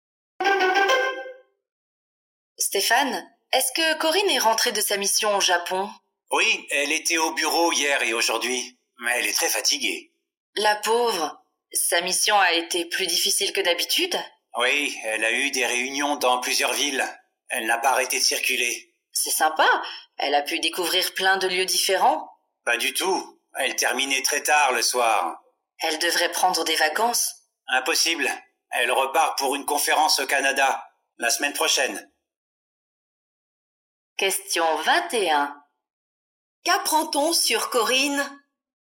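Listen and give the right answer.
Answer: Elle est très fatiguée et repart bientôt en mission au Canada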